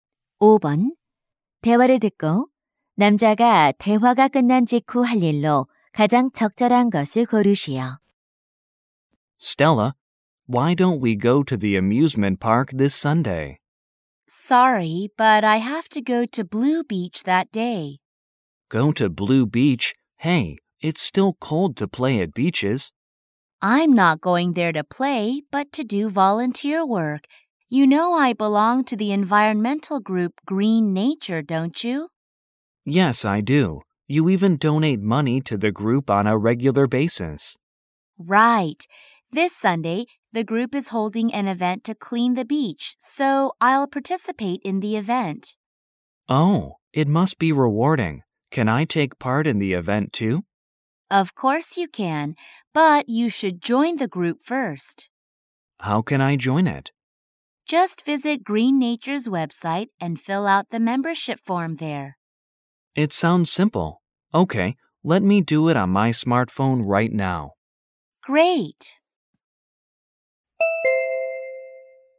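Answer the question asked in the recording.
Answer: 스마트폰으로 Green Nature 웹사이트에서 회원 가입 신청서 작성하기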